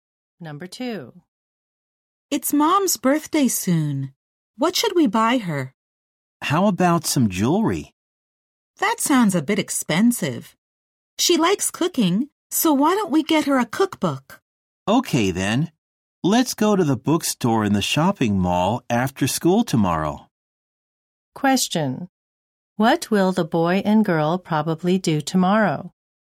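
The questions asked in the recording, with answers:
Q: What will the boy and girl probably do tomorrow?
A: Go to the bookstore to buy their mom a cookbook.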